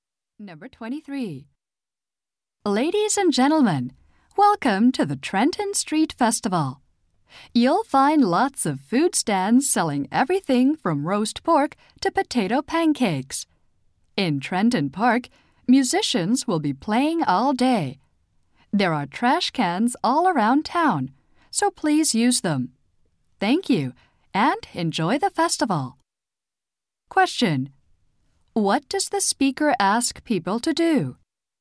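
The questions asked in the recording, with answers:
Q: Question: What does the speaker ask people to do?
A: Use the trash cans.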